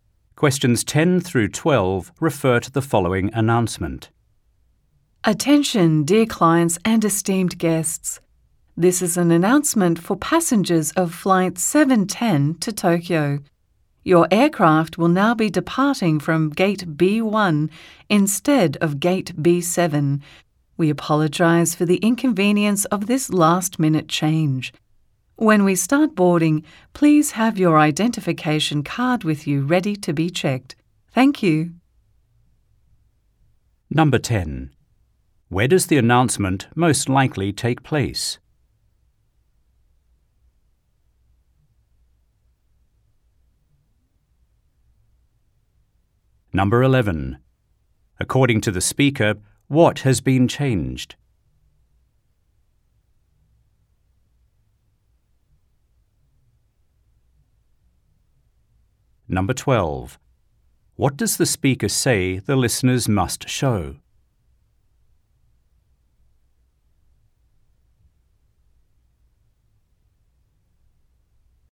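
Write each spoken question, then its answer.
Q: Where does the announcement most likely take place?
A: At an airport

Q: According to the speaker, what has been changed?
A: The departure gate

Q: What does the speaker say the listeners must show?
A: Their identification card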